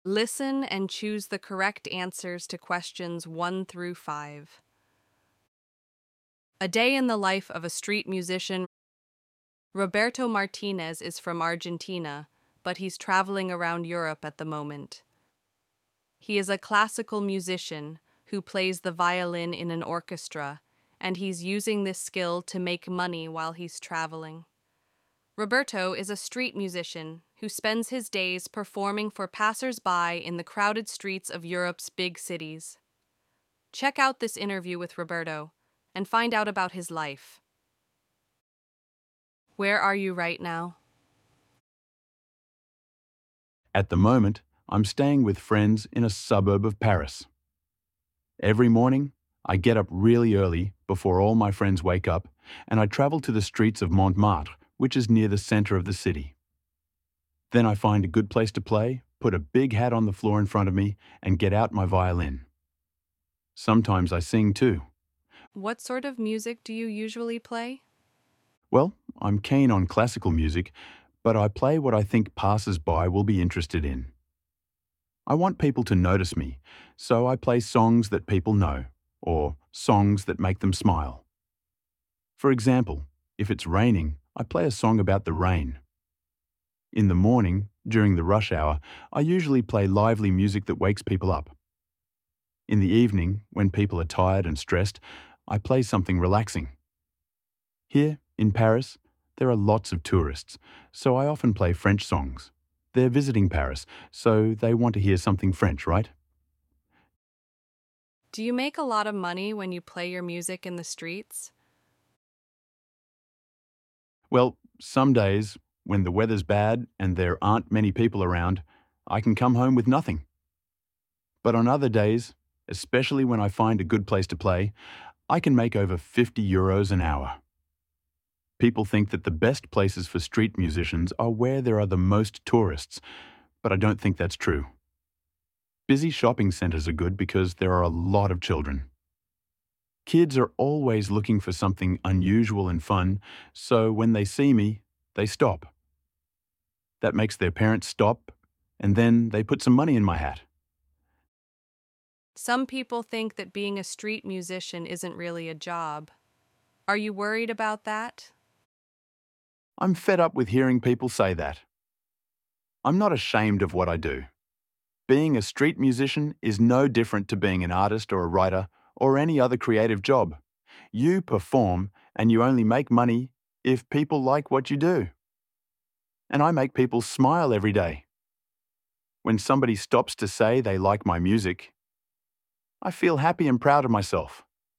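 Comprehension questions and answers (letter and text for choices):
Listen and choose the correct answers to questions 1-5.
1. Where is Roberto staying at the moment?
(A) A hotel in Paris.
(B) With friends in a Parisian suburb.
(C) In Montmartre city centre.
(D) In a busy shopping centre.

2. Why does Roberto play French songs in Paris?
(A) He dislikes classical music.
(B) Tourists want to hear something French.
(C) He wants to practice hi French.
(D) French songs earn the most money.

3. What does Roberto do during rush hour?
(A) Plays relaxing music.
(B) Sings songs about rain.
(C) Plays lively music.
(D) Takes a break.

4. Where does Roberto say is NOT the best place for street musicians?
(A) Busy shopping centres.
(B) Areas with tourists.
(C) Quiet suburbs.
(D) Streets with children.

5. How does Roberto feel about people criticising street musicians?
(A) he agrees with them.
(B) he is ashamed.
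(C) he is fed up.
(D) he ignores them.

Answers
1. (B) With friends in a Parisian suburb.
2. (B) Tourists want to hear something French.
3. (C) Plays lively music.
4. (B) Areas with tourists.
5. (C) he is fed up.

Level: 9-10 კლასი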